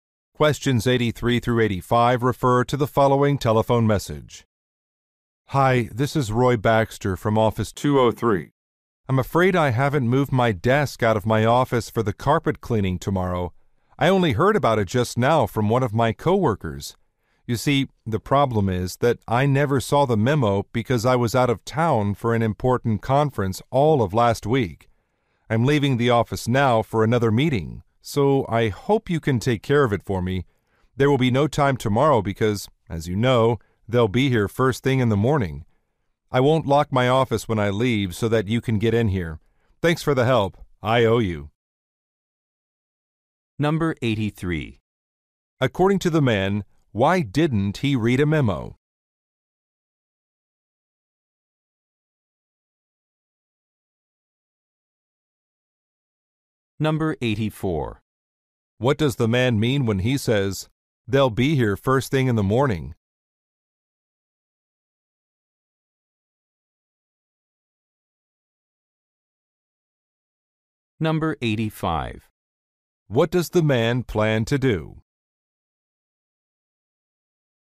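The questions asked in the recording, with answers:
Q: According to the man, why didn't he read a memo?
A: He was out of town at a conference

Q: What does the man mean when he says, they'll be here first thing in the morning?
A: The desk must be moved today

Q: What does the man plan to do?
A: Leave his office unlocked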